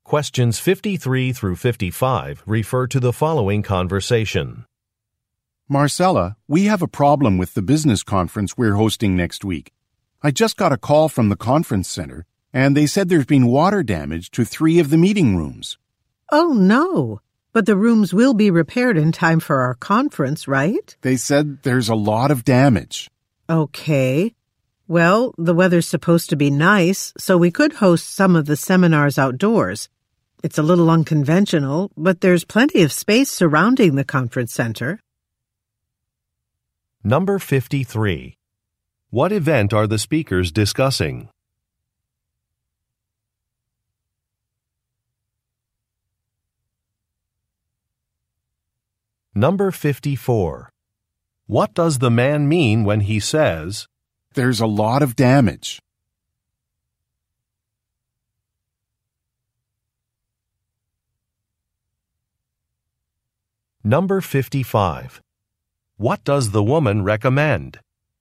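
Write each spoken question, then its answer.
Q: What event are the speakers discussing?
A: A business conference

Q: What does the man mean when he says, "There's a lot of damage"?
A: The rooms probably won't be repaired in time for the conference

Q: What does the woman recommend?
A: Holding some of the seminars outdoors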